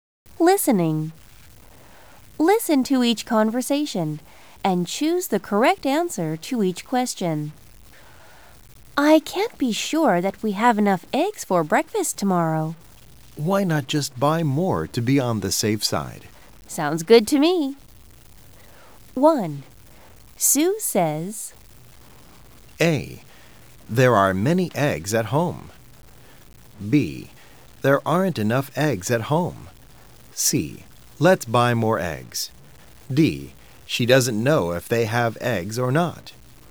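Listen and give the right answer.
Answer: D: She doesn't know if they have eggs or not.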